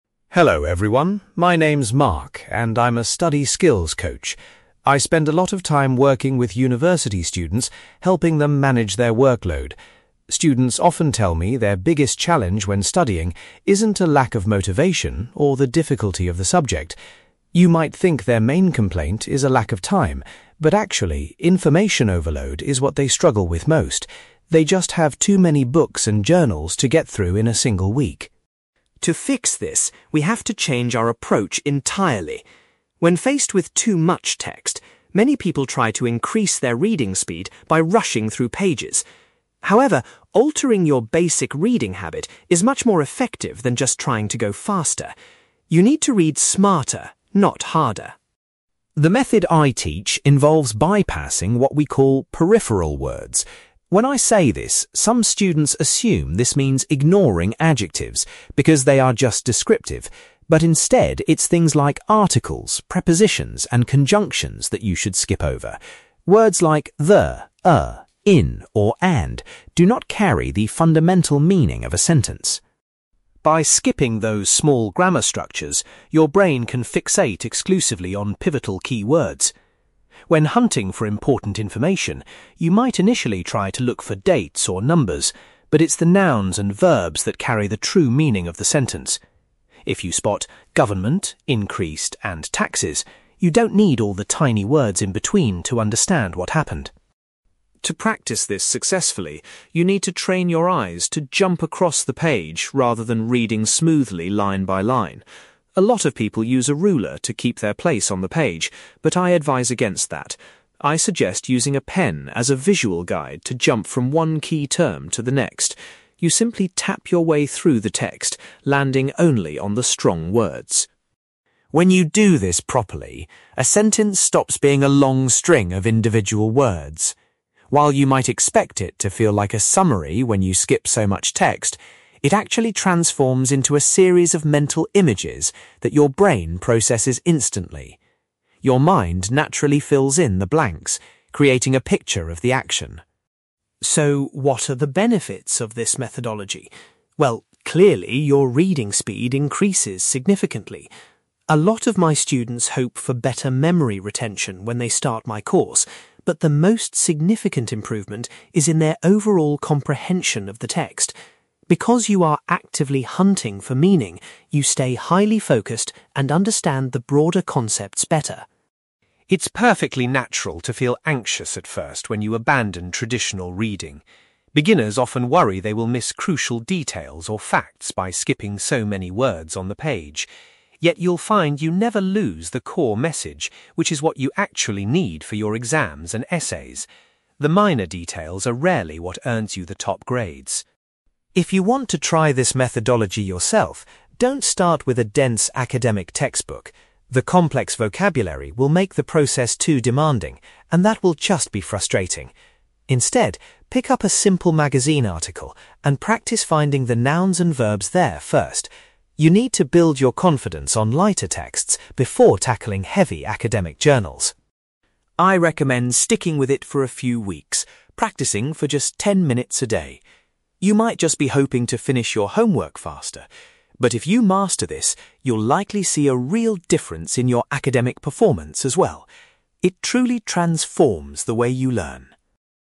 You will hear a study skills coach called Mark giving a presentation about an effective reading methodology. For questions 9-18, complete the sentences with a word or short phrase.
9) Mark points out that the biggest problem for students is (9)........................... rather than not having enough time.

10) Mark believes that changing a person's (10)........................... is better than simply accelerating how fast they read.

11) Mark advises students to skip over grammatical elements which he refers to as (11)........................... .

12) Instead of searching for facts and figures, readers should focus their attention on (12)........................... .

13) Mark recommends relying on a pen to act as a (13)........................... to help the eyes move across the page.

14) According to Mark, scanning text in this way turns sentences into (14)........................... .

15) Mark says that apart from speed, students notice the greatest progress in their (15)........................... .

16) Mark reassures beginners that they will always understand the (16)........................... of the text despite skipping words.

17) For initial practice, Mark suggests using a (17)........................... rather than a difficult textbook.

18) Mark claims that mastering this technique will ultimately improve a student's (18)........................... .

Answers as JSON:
{"9": "information overload", "10": "reading habit", "11": "peripheral words", "12": "pivotal keywords", "13": "visual guide", "14": "mental images", "15": "overall comprehension", "16": "core message", "17": "magazine article", "18": "academic performance"}

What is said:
Mark: Hello everyone, my name is Mark, and I'm a study skills coach. I spend a lot of time working with university students, helping them manage their workload. Students often tell me their biggest challenge when studying isn't a lack of motivation, or the difficulty of the subject. You might think their main complaint is a lack of time, but actually, information overload is what they struggle with most. They just have too many books and journals to get through in a single week.
To fix this, we have to change our approach entirely. When faced with too much text, many people try to increase their reading speed by rushing through pages. However, altering your basic reading habit is much more effective than just trying to go faster. You need to read smarter, not harder.
The method I teach involves bypassing what we call peripheral words. When I say this, some students assume this means ignoring adjectives, because they are just descriptive, but instead, it's things like articles, prepositions, and conjunctions that you should skip over. Words like 'the', 'a', 'in', or 'and' do not carry the fundamental meaning of a sentence.
By skipping those small grammar structures, your brain can fixate exclusively on pivotal keywords. When hunting for important information, you might initially try to look for dates or numbers, but it's the nouns and verbs that carry the true meaning of the sentence. If you spot 'government', 'increased', and 'taxes', you don't need all the tiny words in between to understand what happened.
To practice this successfully, you need to train your eyes to jump across the page rather than reading smoothly line by line. A lot of people use a ruler to keep their place on the page, but I advise against that. I suggest using a pen as a visual guide to jump from one key term to the next. You simply tap your way through the text, landing only on the strong words.
When you do this properly, a sentence stops being a long string of individual words. While you might expect it to feel like a summary when you skip so much text, it actually transforms into a series of mental images that your brain processes instantly. Your mind naturally fills in the blanks, creating a picture of the action.
So, what are the benefits of this methodology? Well, clearly your reading speed increases significantly. A lot of my students hope for better memory retention when they start my course, but the most significant improvement is in their overall comprehension of the text. Because you are actively hunting for meaning, you stay highly focused and understand the broader concepts better.
It's perfectly natural to feel anxious at first when you abandon traditional reading. Beginners often worry they will miss crucial details or facts by skipping so many words on the page. Yet, you'll find you never lose the core message, which is what you actually need for your exams and essays. The minor details are rarely what earns you the top grades.
If you want to try this methodology yourself, don't start with a dense academic textbook. The complex vocabulary will make the process too demanding, and that will just be frustrating. Instead, pick up a simple magazine article and practice finding the nouns and verbs there first. You need to build your confidence on lighter texts before tackling heavy academic journals.
I recommend sticking with it for a few weeks, practicing for just ten minutes a day. You might just be hoping to finish your homework faster, but if you master this, you'll likely see a real difference in your academic performance as well. It truly transforms the way you learn.

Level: B2